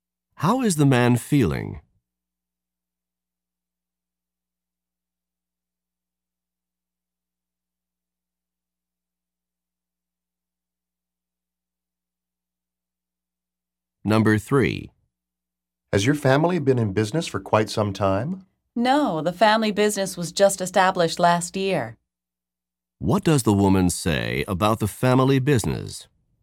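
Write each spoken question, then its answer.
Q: What does the woman say about the family business?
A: It was started only last year.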